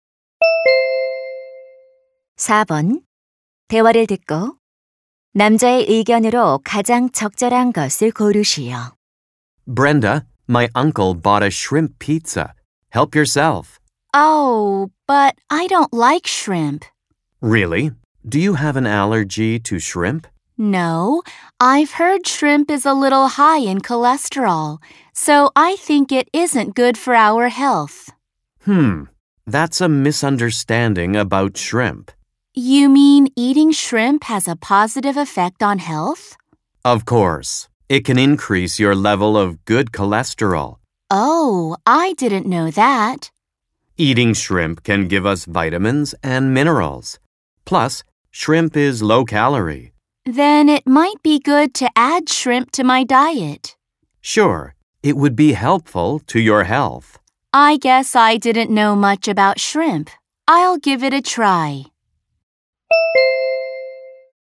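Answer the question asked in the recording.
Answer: 새우를 먹는 것은 건강에 좋다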